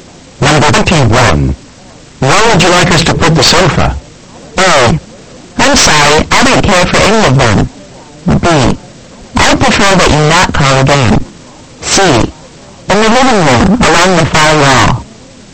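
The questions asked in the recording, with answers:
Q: Where would you like us to put the sofa?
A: C: In the living room, along the far wall.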